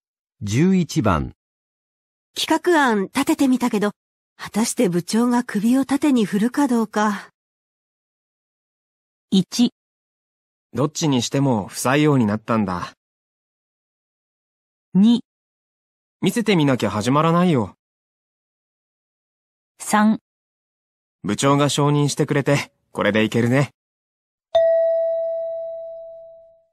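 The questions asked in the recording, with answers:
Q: 企画案立ててみたけど、果たして部長が首を縦に振るかどうか。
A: 2: 見せてみなきゃ始まらないよ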